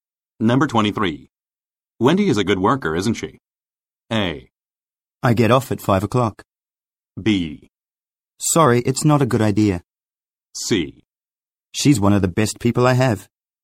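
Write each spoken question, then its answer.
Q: Wendy is a good worker, isn't she?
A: C: She's one of the best people I have.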